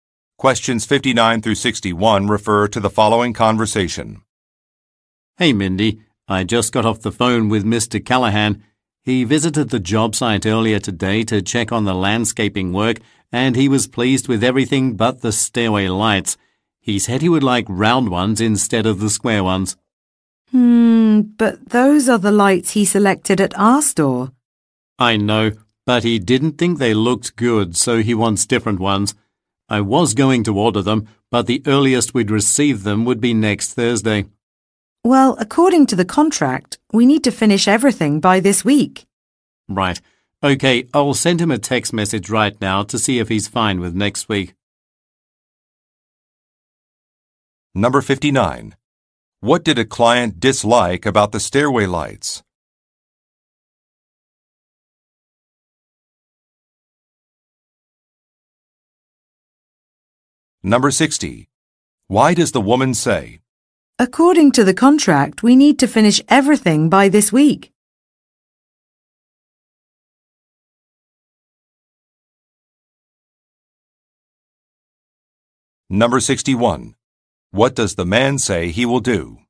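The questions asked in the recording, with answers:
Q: What did a client dislike about the stairway lights?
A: Their shape: he wanted round ones, not square ones

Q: What does the man say he will do?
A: Send the client a text message to see if next week is fine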